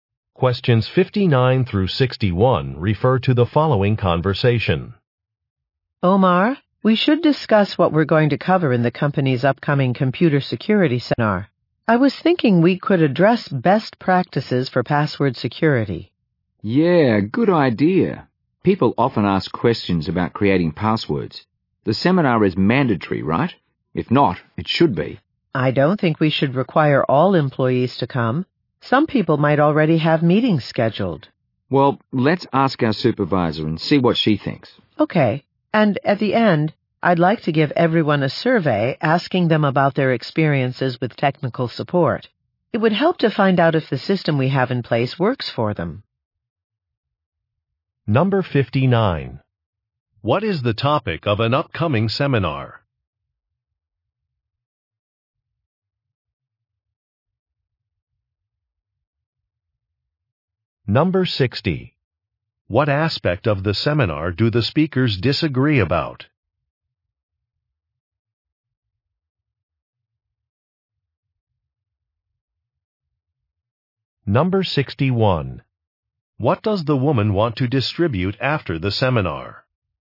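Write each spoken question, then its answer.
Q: What is the topic of an upcoming seminar?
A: Computer security

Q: What aspect of the seminar do the speakers disagree about?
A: Whether attendance should be mandatory

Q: What does the woman want to distribute after the seminar?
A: A survey about technical support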